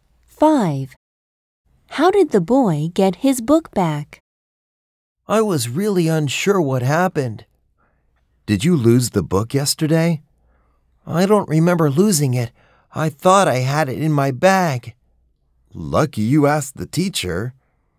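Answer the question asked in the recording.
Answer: He asked the teacher.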